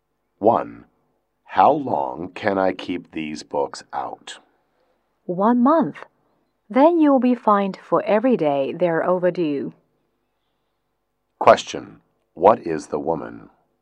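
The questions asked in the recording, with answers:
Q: What is the woman?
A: A librarian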